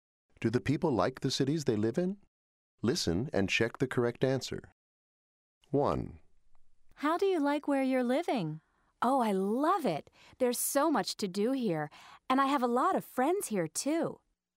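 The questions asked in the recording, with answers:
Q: Do the people like the cities they live in?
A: Yes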